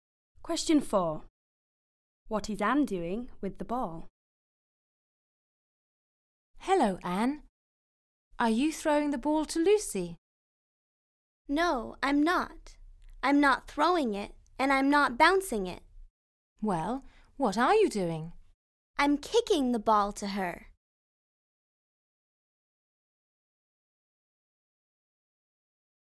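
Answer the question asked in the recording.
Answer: Kicking it to Lucy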